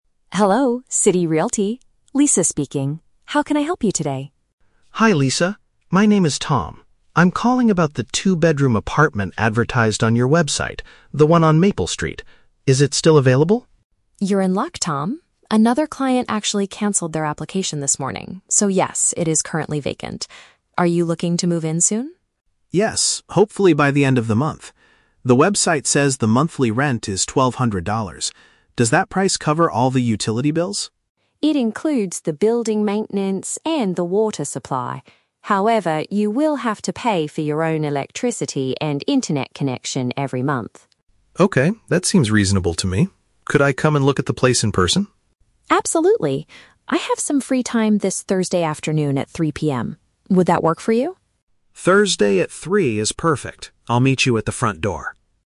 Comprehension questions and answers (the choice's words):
Listen to a telephone conversation between a renter and a real estate agent. Choose the correct answer (A, B, or C) for each question.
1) What is the current status of the apartment on Maple Street?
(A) It was just rented to another client earlier this morning.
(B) It is empty and ready for a new person to rent.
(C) It has been removed from the agency's official website.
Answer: It is empty and ready for a new person to rent.

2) Which monthly expense is already included in the rent?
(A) The electricity bill.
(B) The internet service.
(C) The water supply.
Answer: The water supply.

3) What will Tom do on Thursday afternoon?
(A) Sign the final rental contract at the agency's office.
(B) Move all his furniture into the new apartment.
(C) Visit the property to see it with his own eyes.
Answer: Visit the property to see it with his own eyes.

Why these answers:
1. Lisa says that the apartment is "currently vacant" (empty and ready to rent). Option B perfectly paraphrases this. Option A is the Trap: Lisa mentions "another client" and "this morning", but that client cancelled their application, meaning they did NOT rent it. Option C is not mentioned (Tom just saw it on the website).
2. Lisa clearly states that the rent "includes the building maintenance and the water supply". Option C matches this information. Option A and Option B are Traps: Lisa explicitly mentions that Tom will "have to pay for your own electricity and internet connection", meaning they are not included in the rent.
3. Tom asks to "look at the place in person", and they schedule this for Thursday at 3:00 PM. Option C is a paraphrase of this action (look in person = see it with his own eyes). Option A is the Trap: He is just viewing the apartment, not signing the contract yet. Option B is also a Trap: He hopes to move in "by the end of the month", not this Thursday.

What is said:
Lisa: Hello, City Realty. Lisa speaking. How can I help you today?
Tom: Hi Lisa. My name is Tom. I'm calling about the two-bedroom apartment advertised on your website, the one on Maple Street. Is it still available?
Lisa: You're in luck, Tom. Another client actually cancelled their application this morning, so yes, it is currently vacant. Are you looking to move in soon?
Tom: Yes, hopefully by the end of the month. The website says the monthly rent is twelve hundred dollars. Does that price cover all the utility bills?
Lisa: It includes the building maintenance and the water supply. However, you will have to pay for your own electricity and internet connection every month.
Tom: Okay, that seems reasonable to me. Could I come and look at the place in person?
Lisa: Absolutely. I have some free time this Thursday afternoon at 3:00 PM.